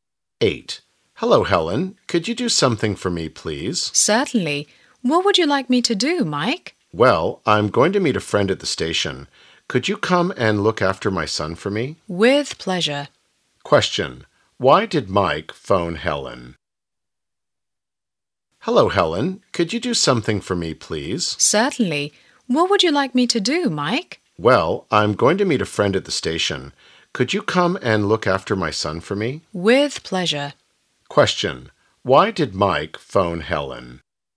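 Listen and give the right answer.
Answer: To ask her to look after his son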